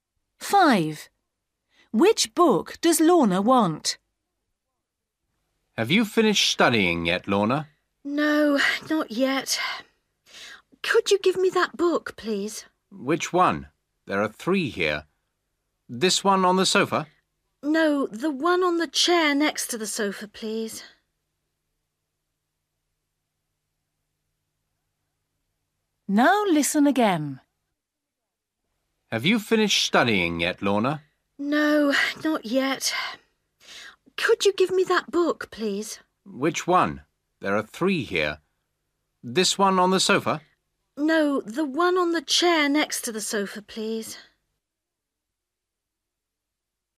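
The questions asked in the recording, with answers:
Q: Which book does Lorna want?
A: The one on the chair next to the sofa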